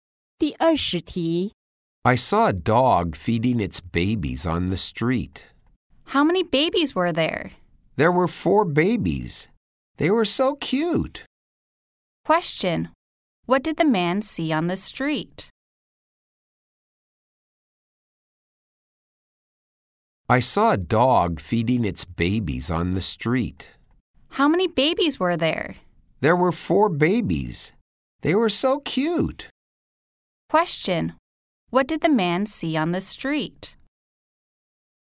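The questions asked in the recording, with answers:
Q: What did the man see on the street?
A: A dog feeding its four babies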